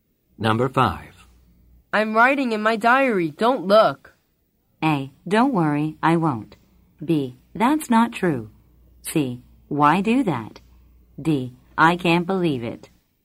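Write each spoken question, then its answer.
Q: I'm writing in my diary. Don't look.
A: A: Don't worry. I won't.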